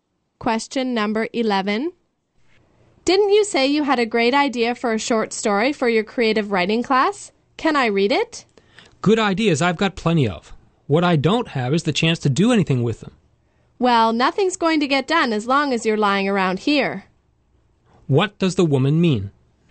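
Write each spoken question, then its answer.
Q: What does the woman mean?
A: He should stop lying around and start writing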